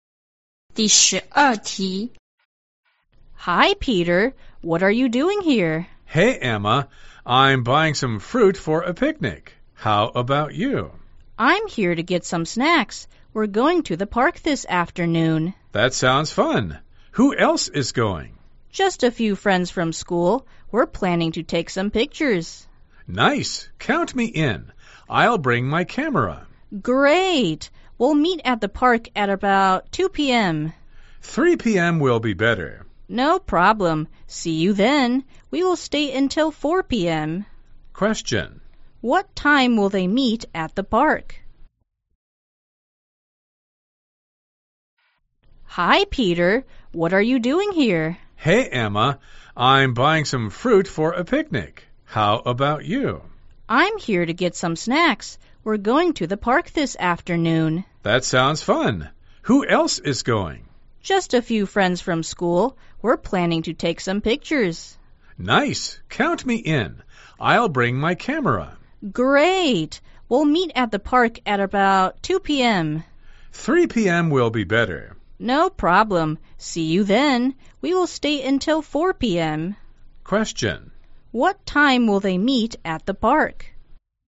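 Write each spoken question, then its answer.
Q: What time will they meet at the park?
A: At 3 p.m.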